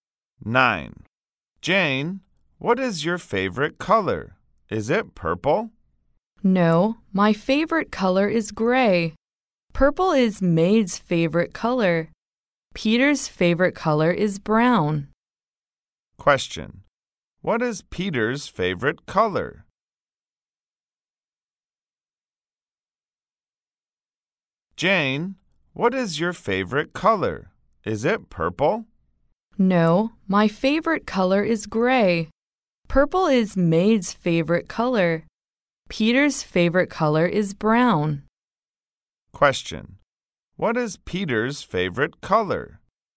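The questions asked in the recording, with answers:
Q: what is Peter's favorite color?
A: Brown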